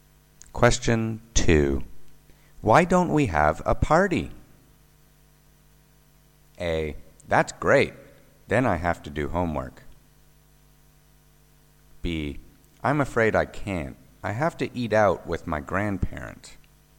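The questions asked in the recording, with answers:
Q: Why don't we have a party?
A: B: I'm afraid I can't. I have to eat out with my grandparents.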